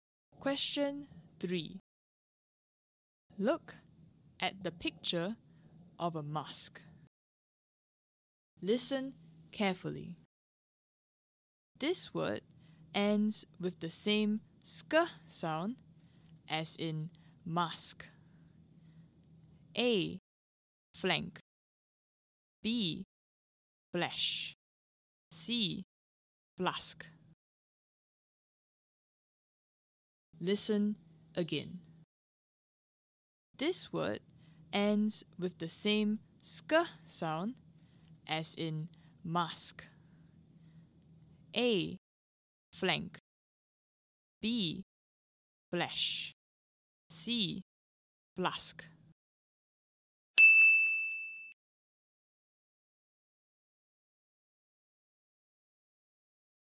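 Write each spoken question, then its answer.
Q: This word ends with the same sk sound as in mask.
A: C: flask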